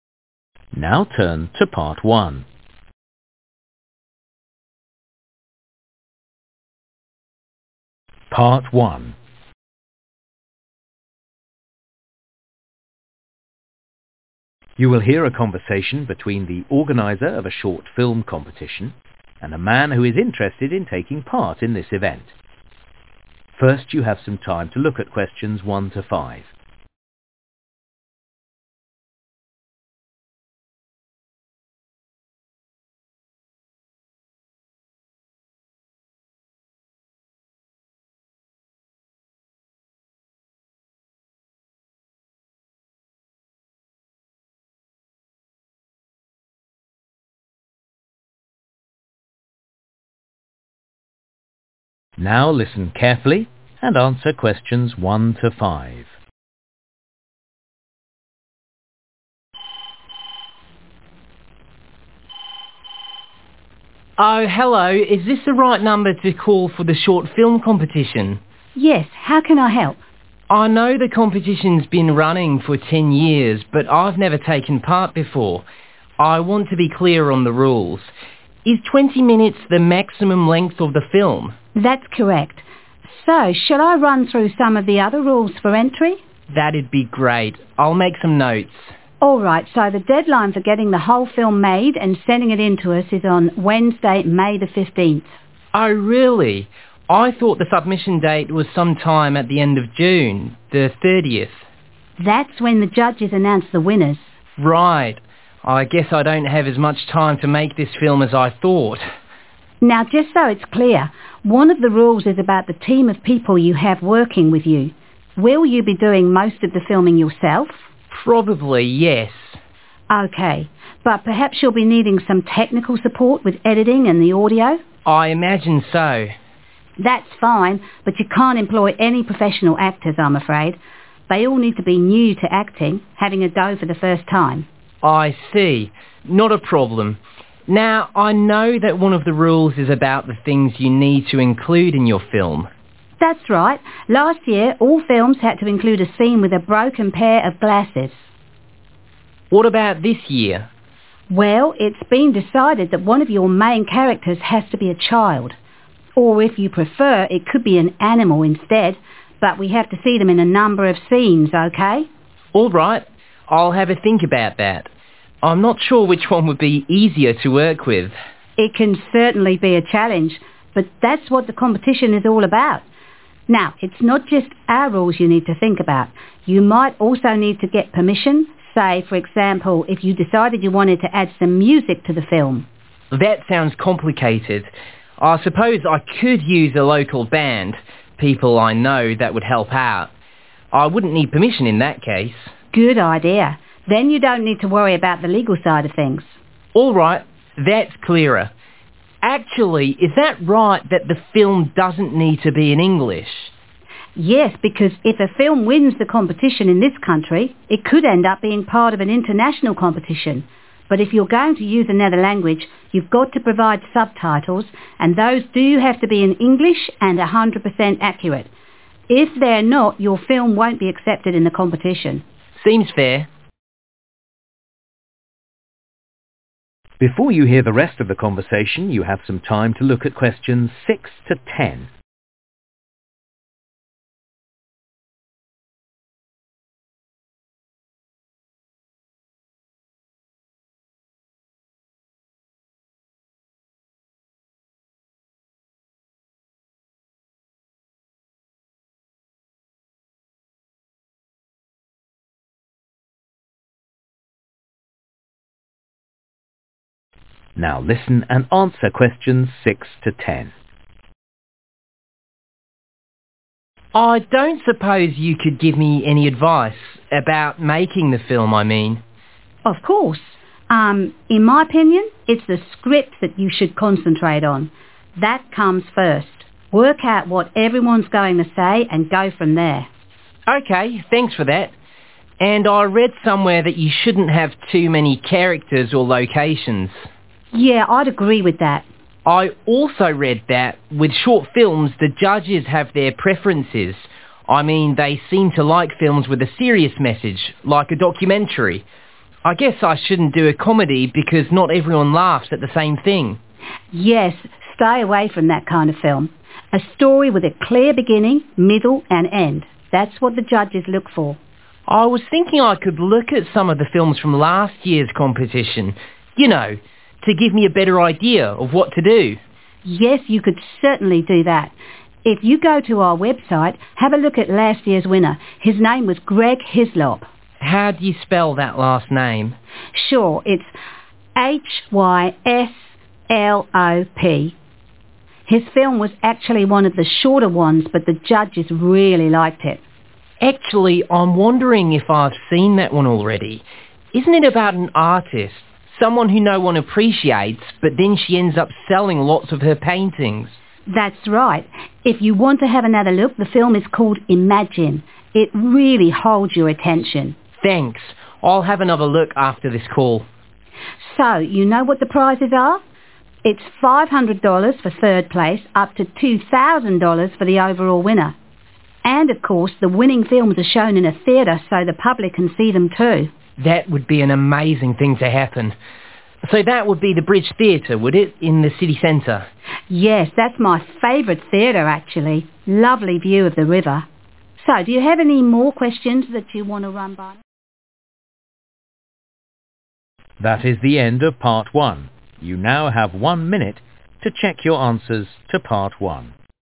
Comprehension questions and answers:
Questions 1-10. Complete the notes below. Write ONE WORD AND / OR A NUMBER for each answer.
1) – submitted before Wednesday,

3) – For the film, it's necessary to include a child or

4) – get permission for any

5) – check that English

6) Focus on the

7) – Avoid making a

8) – The winner was Greg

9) – The title of Greg's film was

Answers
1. 15(th) May
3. animal
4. music
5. subtitles
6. script
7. comedy
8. Hyslop
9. Imagine

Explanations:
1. Alright, so the deadline for getting the whole film made and sending it in to us is on Wednesday, May 15th. [Được rồi, hạn chót để hoàn thành toàn bộ phim và gửi cho chúng tôi là vào thứ Tư, ngày 15 tháng Năm]
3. Well, it's been decided that one of your main characters has to be a child or if you prefer, it could be an animal instead. [Chà, người ta đã quyết định rằng một trong những nhân vật chính của bạn phải là một đứa trẻ hoặc nếu bạn thích, đó có thể là một con vật]

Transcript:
Man: Oh, hello. Is this the right number to call for the short film competition?
Organizer: Yes. How can I help?
Man: I know the competition's been running for ten years, but I've never taken part before. I want to be clear on the rules. Is 20 minutes the maximum length of the film?
Organizer: That's correct. So should I run through some of the other rules for entry?
Man: That'd be great. I'll make some notes.
Organizer: (Q1) Alright, so the deadline for getting the whole film made and sending it in to us is on Wednesday, May 15th.
Man: Oh, really? I thought the submission date was some time at the end of June the 30th.
Organizer: That's when the judges announce the winners.
Man: Right. I guess I don't have as much time to make this film as I thought.
Organizer: Now, just so it's clear, one of the rules is about the team of people you have working with you. Will you be doing most of the filming yourself?
Man: Probably yes.
Organizer: Okay. But perhaps you'll be needing some technical support with editing and the audio.
Man: I imagine so.
Organizer: That's fine. (Q2) But you can't employ any (= don't use) professional (= with experience) actors I'm afraid. Having a go for the first time
Man: I see, not a problem. Now, I know that one of the rules is about the things you need to include in your film.
Organizer: That's right. Last year all films had to include a scene with a broken pair of glasses.
Man: What about this year?
Organizer: (Q3) Well, it's been decided that one of your main characters has to be a child or if you prefer, it could be an animal instead. Okay?.
Man: All right. I'll have a think about that. I'm not sure which one would be easier to work with.
Organizer: It can certainly be a challenge, but that's what the competition is all about. Now. It's not just our rules you need to think about. (Q4) You might also need to get permission, say, for example, if you decided you wanted to add some music to the film.
Man: That sounds complicated. I suppose I could use a local band. People I know that would help out. I wouldn't need permission in that case.
Organizer: Good idea. Then you don't need to worry about the legal side of things.
Man: All right. That's clearer, actually is that right that the film doesn't need to be in English?
Organizer: Yes. Because if a film wins the competition in this country, it could end up being part of an international competition. (Q5) But if you're going to use another language, you've got to provide subtitles and those do have to be in English and 100% accurate (= contain no mistakes).
Man: Seems fair.
Man: I don't suppose you could give me any advice about making the film, I mean
Organizer: Of course, in my opinion, (Q6) it's the script that you should concentrate on (= focus on). That comes first (= before doing anything else), work out what everyone's going to say and go from there.
Man: Okay. Thanks for that. And I read somewhere that you shouldn't have too many characters or locations.
Organizer: Yeah, I'd agree with that.
Man: I also read that with short films, the judges have their preferences. I mean, they seem to like films with a serious message, like a documentary. (Q7) I guess I shouldn't do (= avoid) a comedy because not everyone laughs at the same thing.
Organizer: Yes. Stay away from that kind of film. A story with a clear beginning, middle and end, that's what the judges look for.
Man: I was thinking I could look at some of the films from last year's competition. You know, to give me a better idea of what to do.
Organizer: Yes, you could certainly do that. (Q8) If you go to our website, have a look at last year's winner. His name was Greg Hyslop.
Man: How do you spell that last name?
Organizer: Sure. It's H-Y-S-L-O-P. His film was actually one of the shorter ones, but the judges really liked it.
Man: Actually, I'm wondering if I've seen that one already, isn't it about an artist, someone who no one appreciates, but then she ends up selling lots of her paintings?
Organizer: That's right. (Q9) If you want to have another look, the film is called Imagine.
Man: Thanks. I'll have another look after this call.
Organizer: So you know what the prices are? It's $500 for third place, up to $2,000 for the overall winner. And, of course, the winning films are shown in a theater so the public can see them, too.
Man: That would be an amazing thing to happen. (Q10) So that would be the Bridge theater.
Organizer: Yes. That's my favorite theater, actually. Lovely view of the river. So, do you have any more questions that you want to run by?